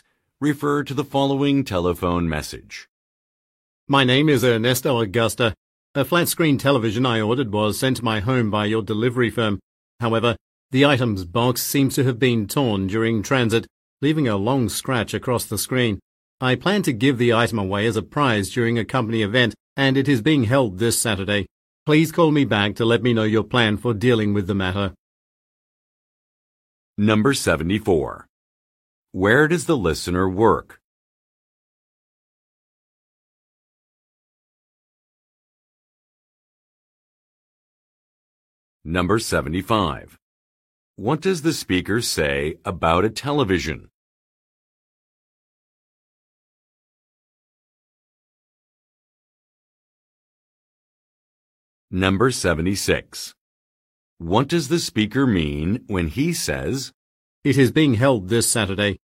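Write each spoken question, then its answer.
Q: Where does the listener work?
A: At a delivery firm

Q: What does the speaker say about a television?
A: It was damaged (its screen was scratched) during delivery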